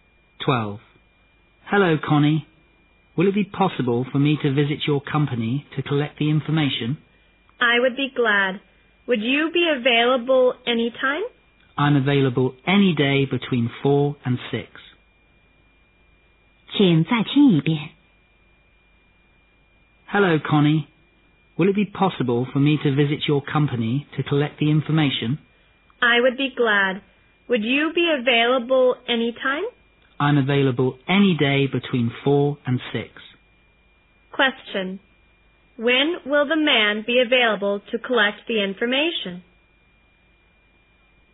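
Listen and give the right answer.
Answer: Any day between 4 and 6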